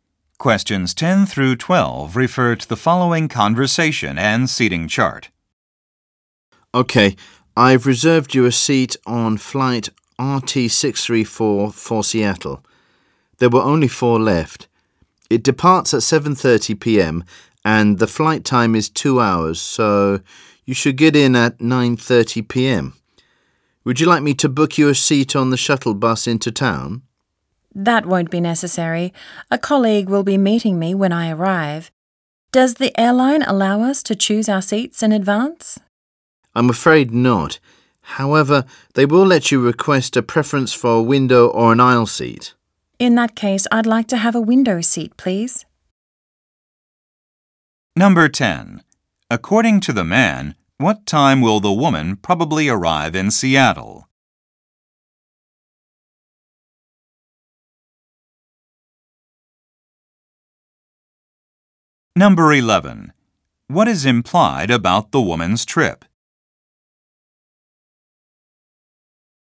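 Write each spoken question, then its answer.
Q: According to the man, what time will the woman probably arrive in Seattle?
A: 9:30 p.m.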